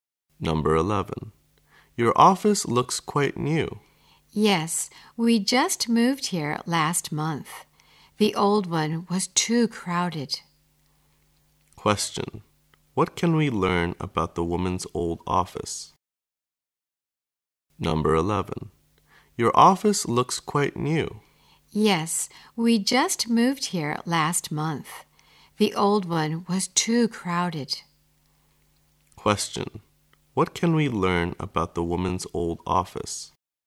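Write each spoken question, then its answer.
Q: what can we learn about the woman's old office?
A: It was too crowded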